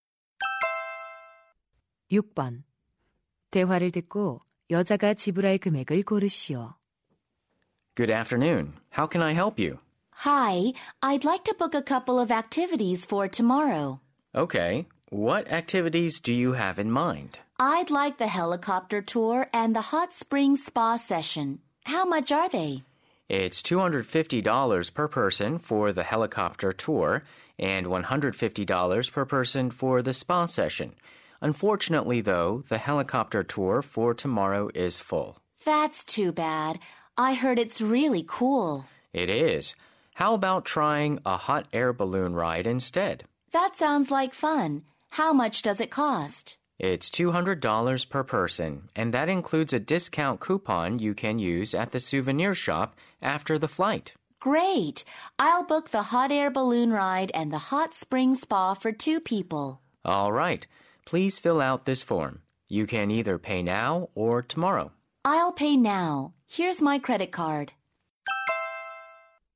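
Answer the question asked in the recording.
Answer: $700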